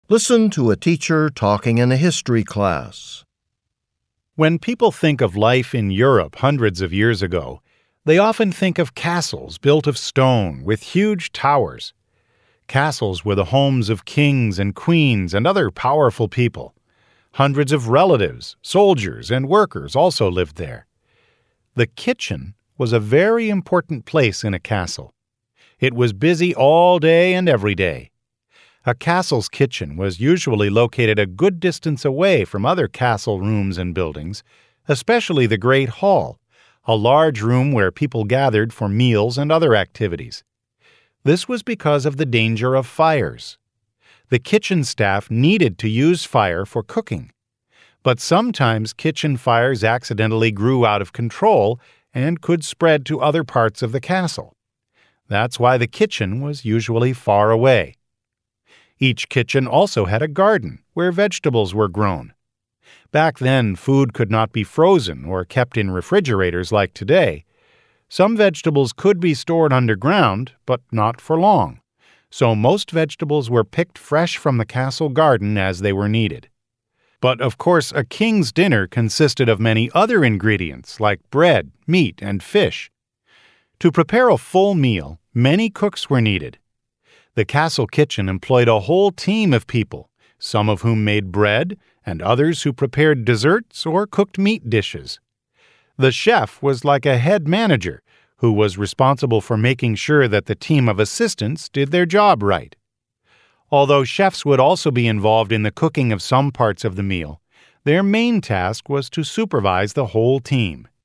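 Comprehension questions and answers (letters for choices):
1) What was important about the location of a castle's kitchen?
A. It was connected to the great hall.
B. It was below the chef's living area.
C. It allowed food to be served hot.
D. It protected castle residents from fires.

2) What does the teacher say about vegetables?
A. They were expensive.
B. They were grown in the castle's garden.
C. They were bought from nearby villages.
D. They were kept frozen in winter.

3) According to the teacher, what was the chef's main responsibility?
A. Managing the kitchen workers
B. Buying the ingredients for meals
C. Baking bread for everyone in the castle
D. Presenting the food to the king and queen.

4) What is the main topic of the talk?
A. Unusual foods served in castles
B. The training of cooks in castles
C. The earliest known castle kitchen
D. The workings of a castle's kitchen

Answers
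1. D
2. B
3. A
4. D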